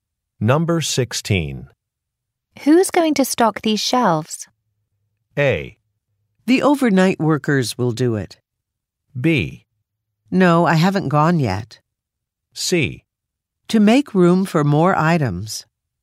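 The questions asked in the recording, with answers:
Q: Who's going to stock these shelves?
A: A: The overnight workers will do it.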